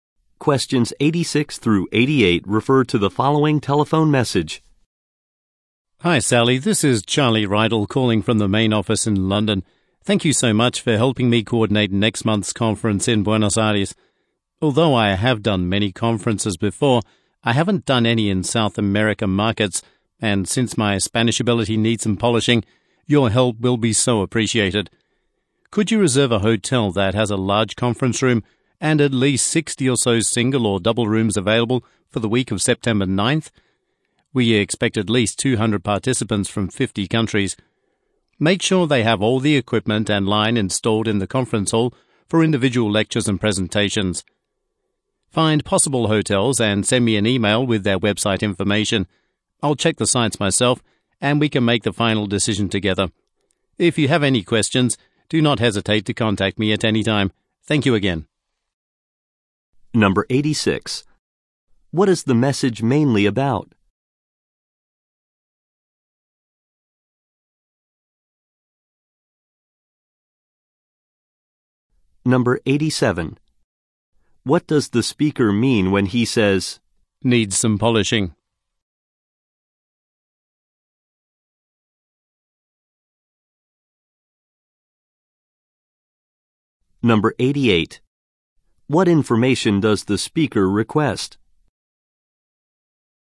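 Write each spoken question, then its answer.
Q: What is the message mainly about?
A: Arranging a conference in Buenos Aires

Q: What does the speaker mean when he says, "Needs some polishing"?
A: His Spanish needs improvement

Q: What information does the speaker request?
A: Hotel website information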